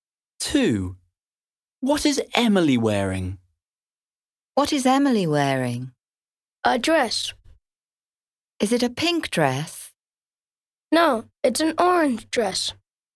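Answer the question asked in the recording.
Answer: An orange dress.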